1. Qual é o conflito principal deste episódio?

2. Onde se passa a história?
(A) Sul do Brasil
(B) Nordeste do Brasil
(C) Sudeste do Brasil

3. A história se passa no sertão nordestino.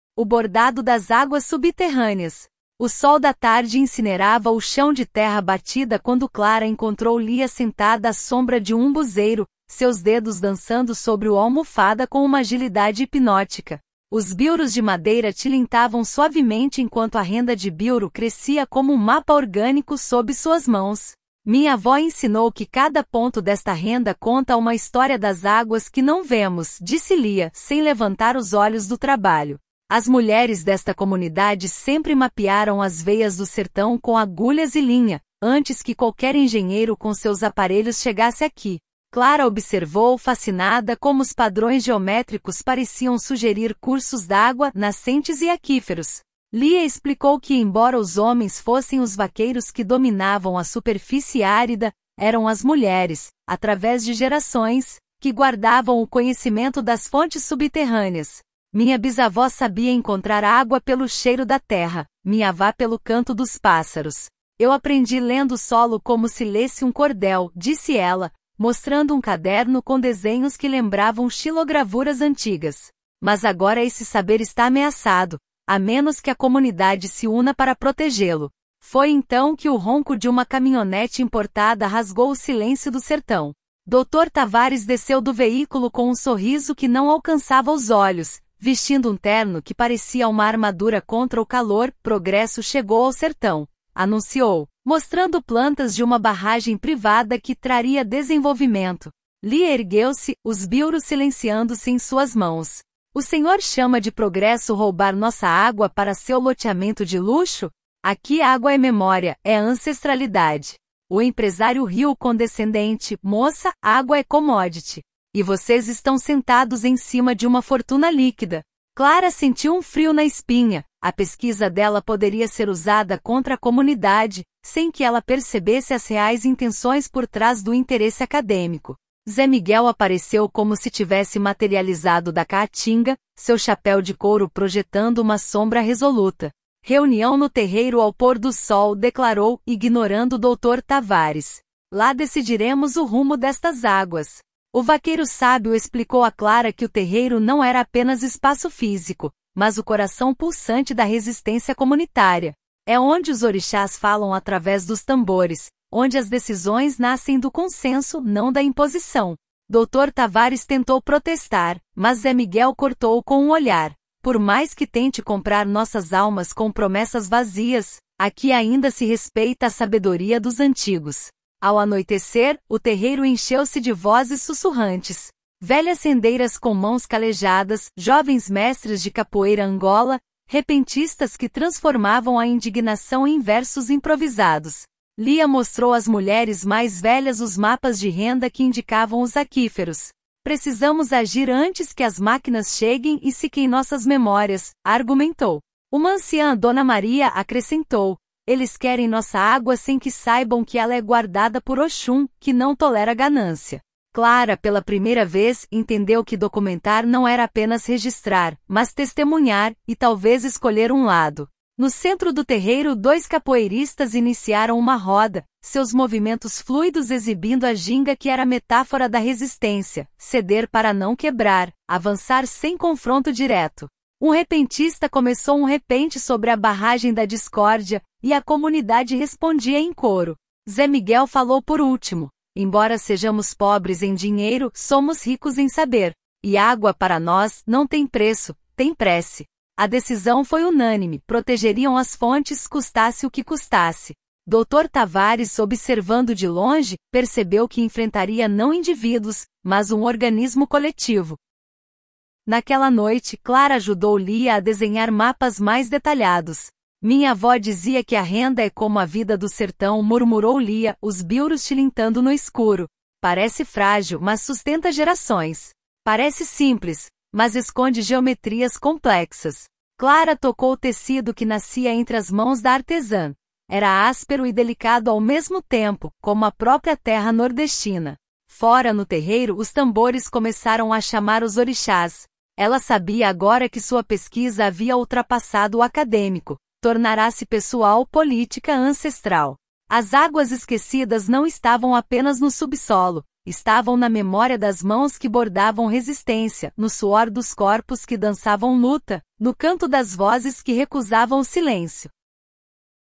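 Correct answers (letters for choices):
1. Dr. Tavares quer construir uma barragem privada para levar a água da comunidade para seu loteamento de luxo, e a comunidade resiste para proteger as fontes.
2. B
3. Verdadeiro

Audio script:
O Bordado das Águas Subterrâneas – TEST
O sol da tarde incinerava o chão de terra batida quando Clara encontrou Lia sentada à sombra de um umbuzeiro, seus dedos dançando sobre o almofada com uma agilidade hipnótica. Os bilros de madeira tilintavam suavemente enquanto a renda de bilro crescia como um mapa orgânico sob suas mãos. 'Minha avó ensinou que cada ponto desta renda conta uma história das águas que não vemos', disse Lia, sem levantar os olhos do trabalho. 'As mulheres desta comunidade sempre mapearam as veias do sertão com agulhas e linha, antes que qualquer engenheiro com seus aparelhos chegasse aqui.' Clara observou, fascinada, como os padrões geométricos pareciam sugerir cursos d'água, nascentes e aquíferos.
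Lia explicou que, embora os homens fossem os vaqueiros que dominavam a superfície árida, eram as mulheres, através de gerações, que guardavam o conhecimento das fontes subterrâneas. 'Minha bisavó sabia encontrar água pelo cheiro da terra, minha avá pelo canto dos pássaros. Eu aprendi lendo o solo como se lesse um cordel', disse ela, mostrando um caderno com desenhos que lembravam xilogravuras antigas. 'Mas agora esse saber está ameaçado, a menos que a comunidade se una para protegê-lo.' Foi então que o ronco de uma caminhonete importada rasgou o silêncio do sertão.
Dr. Tavares desceu do veículo com um sorriso que não alcançava os olhos, vestindo um terno que parecia uma armadura contra o calor. 'Progresso chegou ao sertão!', anunciou, mostrando plantas de uma barragem privada que 'traria desenvolvimento'. Lia ergueu-se, os bilros silenciando-se em suas mãos. 'O senhor chama de progresso roubar nossa água para seu loteamento de luxo? 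Aqui, água é memória, é ancestralidade.' O empresário riu, condescendente: 'Moça, água é commodity. E vocês estão sentados em cima de uma fortuna líquida.' Clara sentiu um frio na espinha – a pesquisa dela poderia ser usada contra a comunidade, sem que ela percebesse as reais intenções por trás do interesse acadêmico.
Zé Miguel apareceu como se tivesse materializado da caatinga, seu chapéu de couro projetando uma sombra resoluta. 'Reunião no terreiro ao pôr do sol', declarou, ignorando Dr. Tavares. 'Lá decidiremos o rumo destas águas.' O vaqueiro sábio explicou a Clara que o terreiro não era apenas espaço físico, mas o coração pulsante da resistência comunitária. 'É onde os orixás falam através dos tambores, onde as decisões nascem do consenso, não da imposição.' Dr. Tavares tentou protestar, mas Zé Miguel cortou-o com um olhar: 'Por mais que tente comprar nossas almas com promessas vazias, aqui ainda se respeita a sabedoria dos antigos.'
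Ao anoitecer, o terreiro encheu-se de vozes sussurrantes. Velhas rendeiras com mãos calejadas, jovens mestres de capoeira angola, repentistas que transformavam a indignação em versos improvisados. Lia mostrou às mulheres mais velhas os mapas de renda que indicavam os aquíferos. 'Precisamos agir antes que as máquinas cheguem e sequem nossas memórias', argumentou. Uma anciã, Dona Maria, acrescentou: 'Eles querem nossa água sem que saibam que ela é guardada por Oxum, que não tolera ganância.' Clara, pela primeira vez, entendeu que documentar não era apenas registrar, mas testemunhar – e talvez escolher um lado.
No centro do terreiro, dois capoeiristas iniciaram uma roda, seus movimentos fluidos exibindo a ginga que era metáfora da resistência: ceder para não quebrar, avançar sem confronto direto. Um repentista começou um repente sobre a 'barragem da discórdia', e a comunidade respondia em coro. 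Zé Miguel falou por último: 'Embora sejamos pobres em dinheiro, somos ricos em saber. E água, para nós, não tem preço – tem prece.' A decisão foi unânime: protegeriam as fontes, custasse o que custasse. Dr. Tavares, observando de longe, percebeu que enfrentaria não indivíduos, mas um organismo coletivo.
Naquela noite, Clara ajudou Lia a desenhar mapas mais detalhados. 'Minha avó dizia que a renda é como a vida do sertão', murmurou Lia, os bilros tilintando no escuro. 'Parece frágil, mas sustenta gerações. Parece simples, mas esconde geometrias complexas.' Clara tocou o tecido que nascia entre as mãos da artesã – era áspero e delicado ao mesmo tempo, como a própria terra nordestina. Fora, no terreiro, os tambores começaram a chamar os orixás. Ela sabia agora que sua pesquisa havia ultrapassado o acadêmico; tornara-se pessoal, política, ancestral. As águas esquecidas não estavam apenas no subsolo – estavam na memória das mãos que bordavam resistência, no suor dos corpos que dançavam luta, no canto das vozes que recusavam o silêncio.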